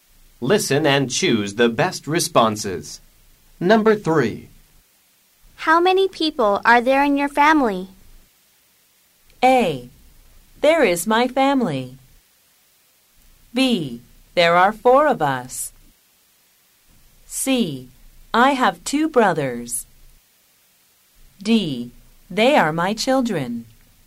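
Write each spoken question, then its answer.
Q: How many people are there in your family?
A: B: There are four of us.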